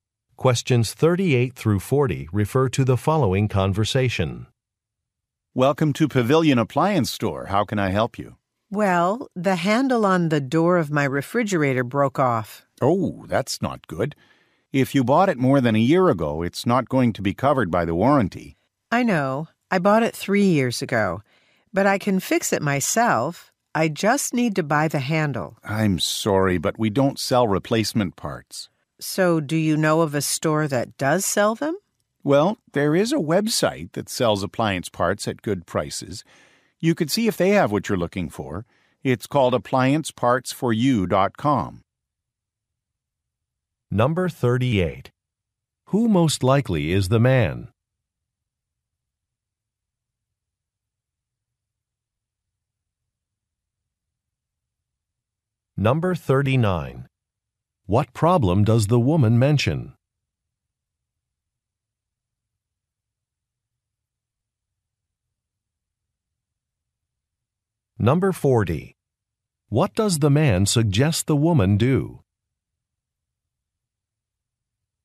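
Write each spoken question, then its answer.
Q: Who most likely is the man?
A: A worker at an appliance store

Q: What problem does the woman mention?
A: The handle on her refrigerator door broke off

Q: What does the man suggest the woman do?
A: Look on a website that sells appliance parts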